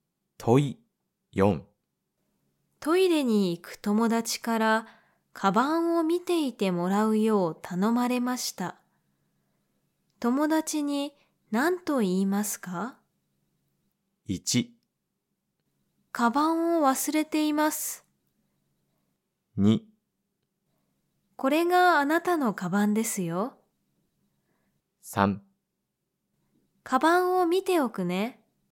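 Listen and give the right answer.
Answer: 3: カバンを見ておくね。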